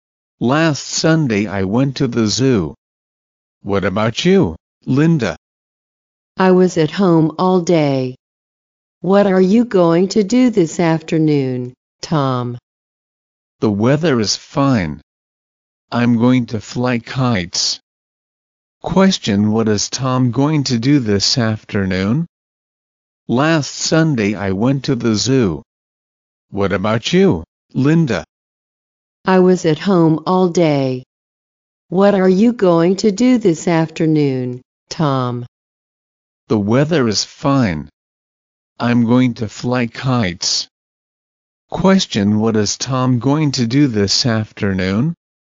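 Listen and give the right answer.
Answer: Fly kites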